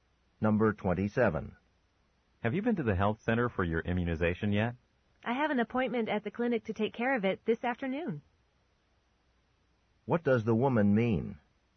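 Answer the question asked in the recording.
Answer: She will get the immunization this afternoon.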